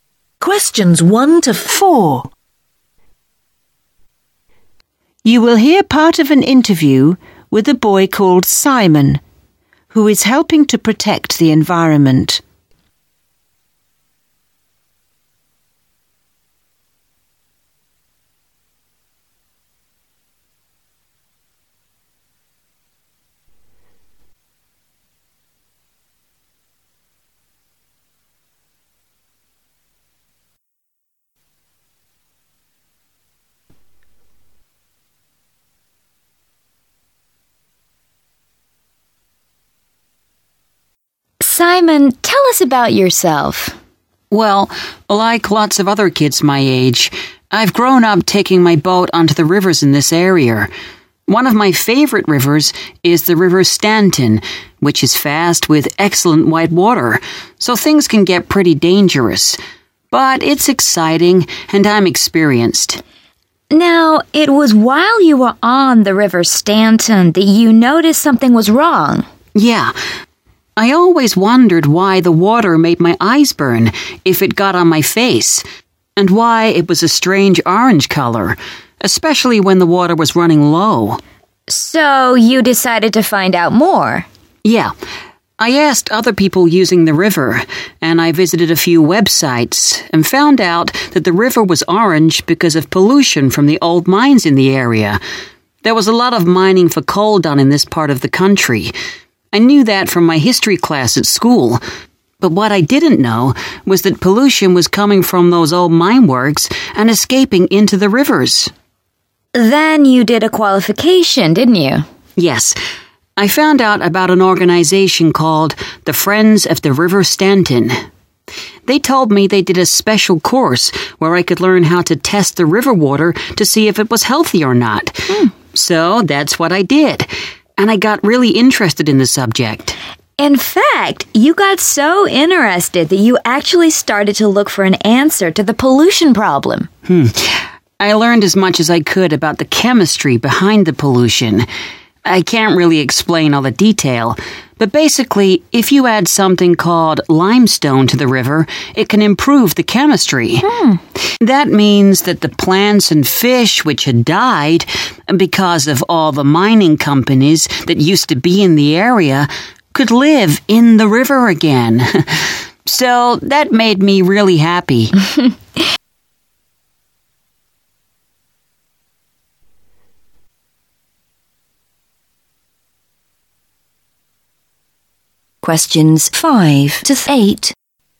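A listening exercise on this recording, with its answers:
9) Why does Simon enjoy taking his boat onto the River Stanton?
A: He likes its water speed.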